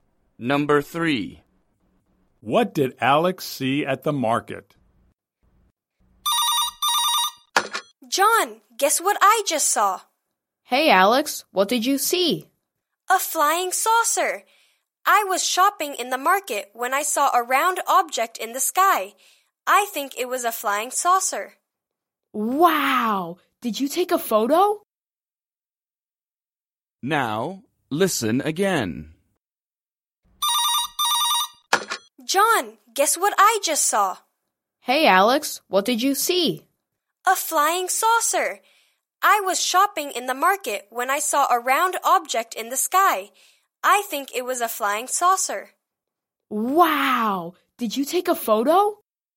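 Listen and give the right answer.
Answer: a flying saucer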